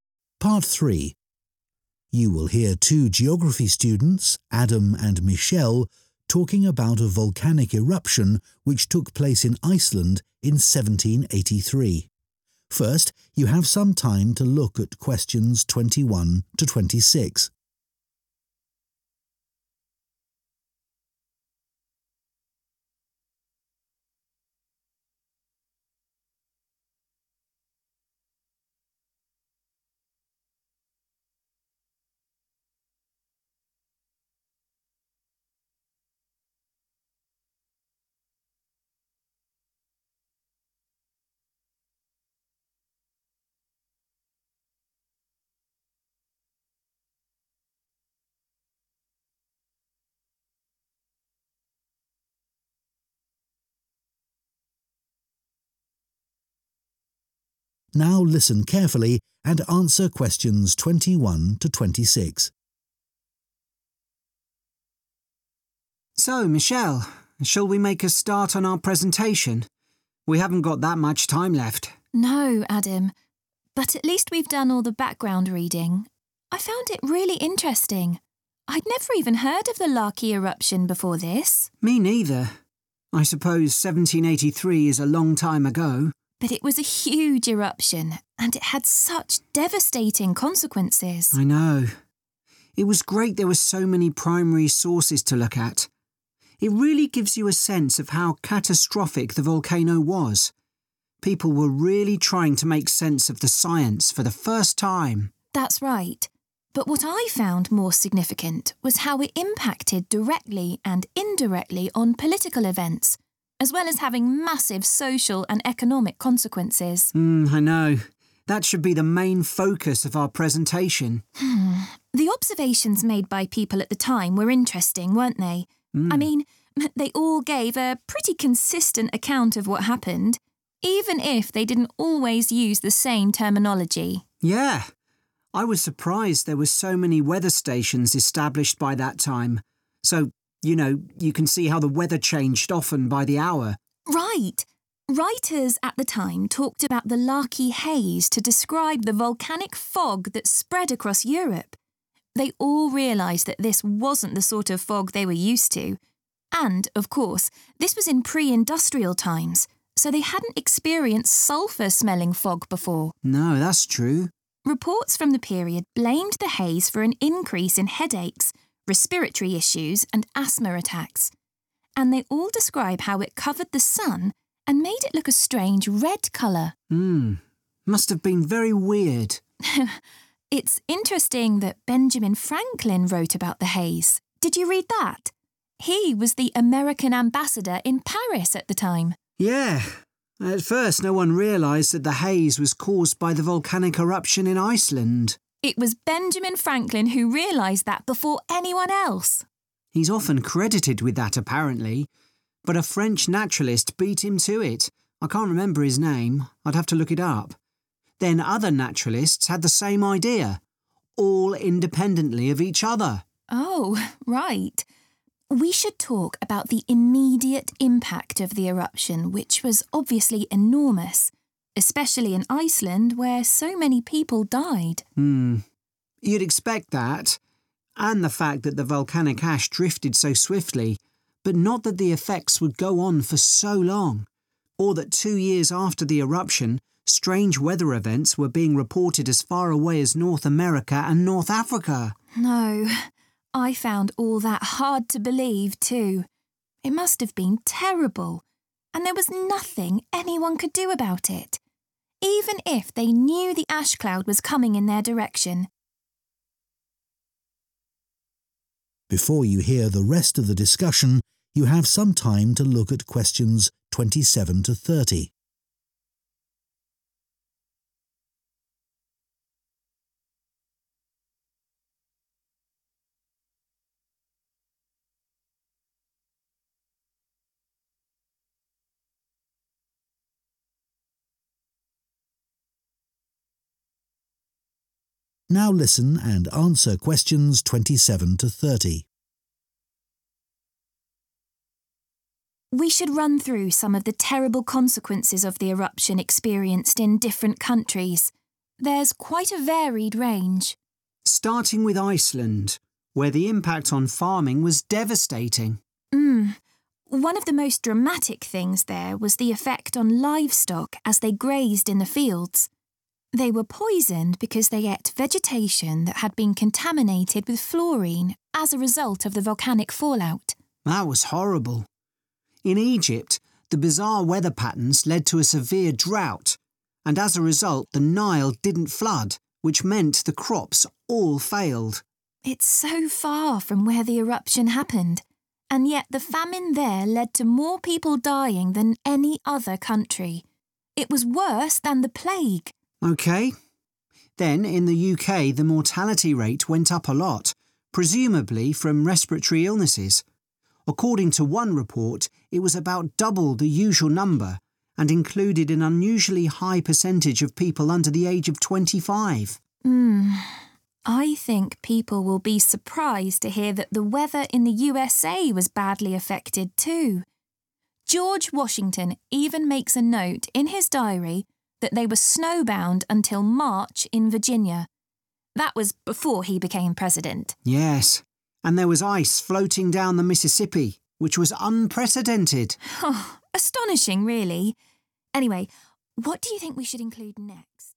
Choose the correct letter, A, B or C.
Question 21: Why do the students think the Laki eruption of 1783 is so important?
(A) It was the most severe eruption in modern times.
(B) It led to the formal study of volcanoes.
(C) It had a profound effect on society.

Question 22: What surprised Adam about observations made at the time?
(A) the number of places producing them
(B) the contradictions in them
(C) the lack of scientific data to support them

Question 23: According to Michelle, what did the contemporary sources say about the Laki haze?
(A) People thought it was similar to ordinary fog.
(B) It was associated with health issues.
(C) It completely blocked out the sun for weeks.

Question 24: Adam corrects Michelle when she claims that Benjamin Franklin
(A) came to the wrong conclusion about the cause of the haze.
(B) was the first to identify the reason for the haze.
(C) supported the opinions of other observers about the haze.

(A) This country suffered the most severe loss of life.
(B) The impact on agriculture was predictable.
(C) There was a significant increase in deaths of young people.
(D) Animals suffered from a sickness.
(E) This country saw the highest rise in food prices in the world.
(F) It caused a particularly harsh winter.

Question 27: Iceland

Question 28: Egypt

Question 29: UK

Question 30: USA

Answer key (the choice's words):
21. It had a profound effect on society.
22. the number of places producing them
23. It was associated with health issues.
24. was the first to identify the reason for the haze.
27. Animals suffered from a sickness.
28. This country suffered the most severe loss of life.
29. There was a significant increase in deaths of young people.
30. It caused a particularly harsh winter.